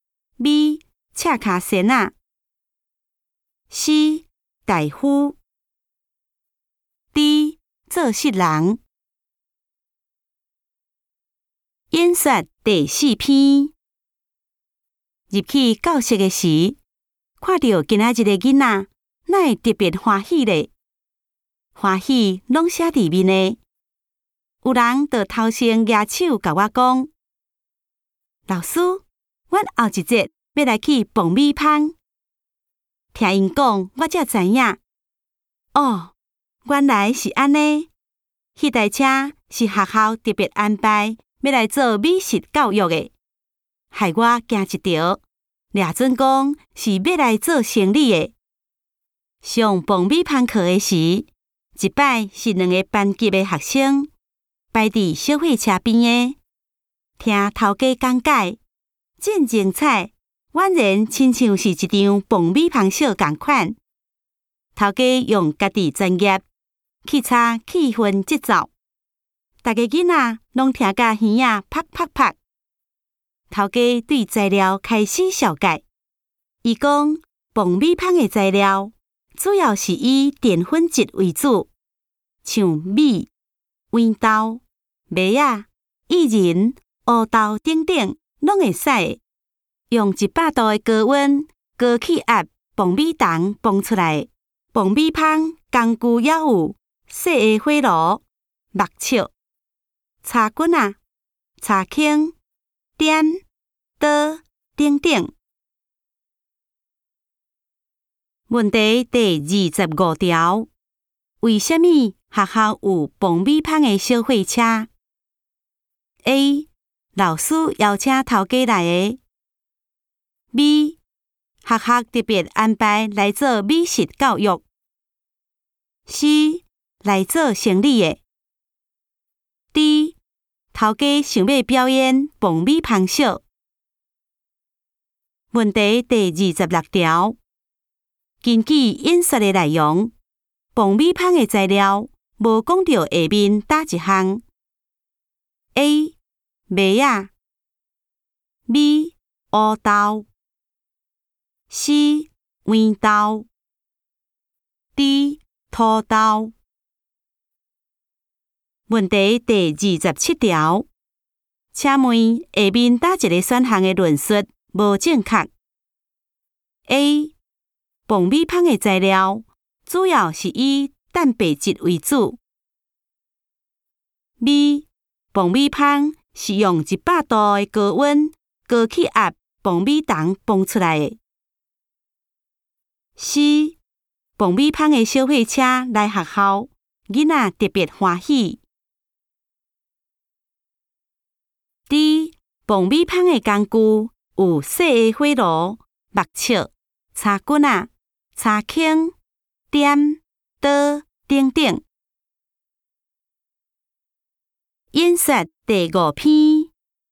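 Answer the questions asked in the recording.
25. B: 学校特别安排来做美食教育。
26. D: 土豆
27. A: 蹦米棒的材料主要是以蛋白质为主。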